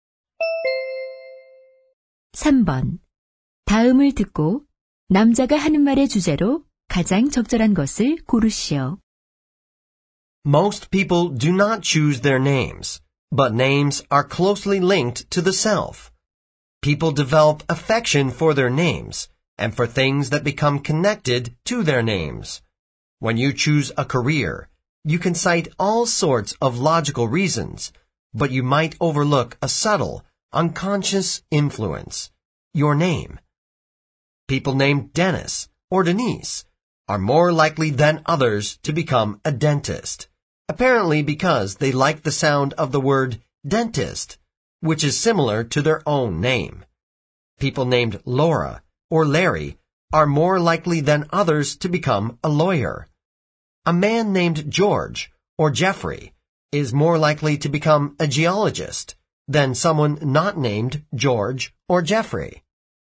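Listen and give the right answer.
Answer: 이름이 직업 선택에 미치는 무의식적 영향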